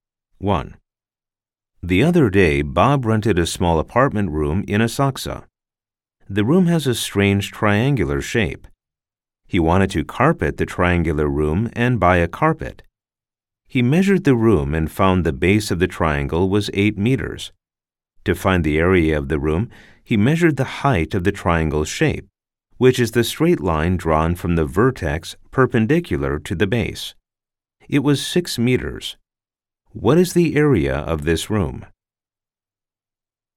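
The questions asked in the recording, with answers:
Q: What is the area of this room?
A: 24 square meters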